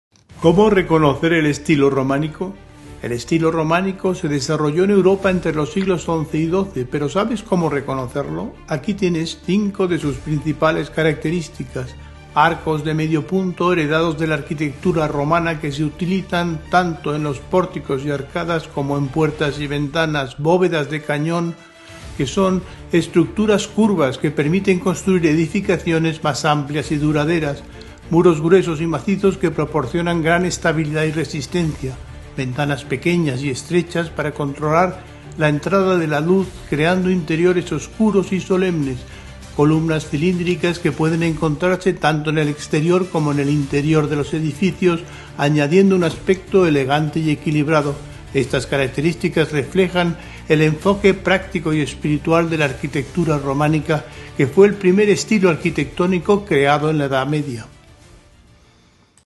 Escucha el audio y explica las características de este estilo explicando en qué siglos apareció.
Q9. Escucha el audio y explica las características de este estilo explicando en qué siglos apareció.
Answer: El estilo románico fue el primer estilo creado en la edad media, aparecido en el siglo XI, se extendió hasta el siglo XIII. Se caracteriza por la utilización de arcos de medio punto, bovedas de canón, muros gruesos y macizos estables, ventanas estrechas para controlar la luz creando interiores oscuros y columnas elegantes.